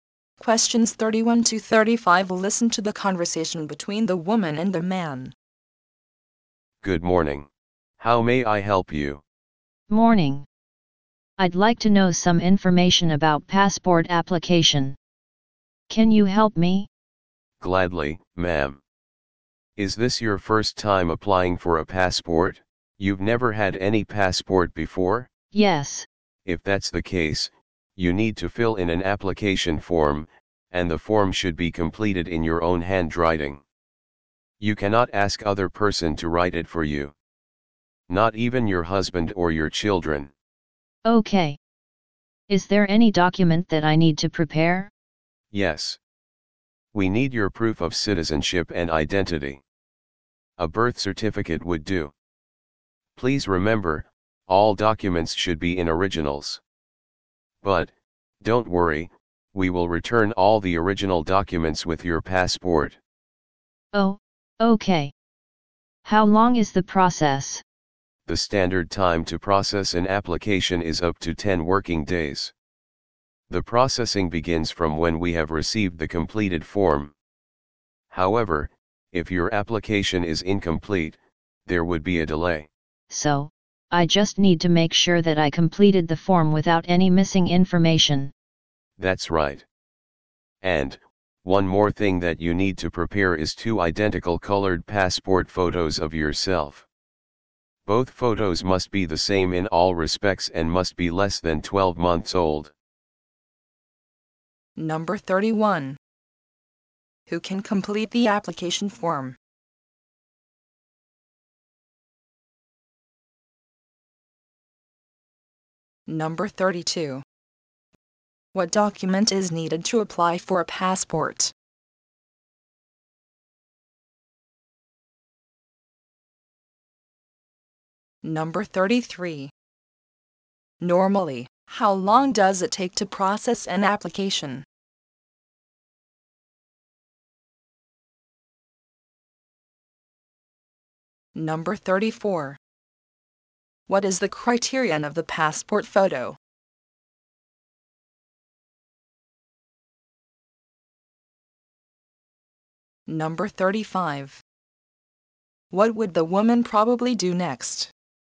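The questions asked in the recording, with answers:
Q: Who can complete the application form?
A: Only the applicant herself

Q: What document is needed to apply for a passport?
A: Proof of citizenship and identity, such as a birth certificate (original)

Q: Normally, how long does it take to process an application?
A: Up to 10 working days

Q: What is the criterion of the passport photo?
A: Two identical colored photos less than 12 months old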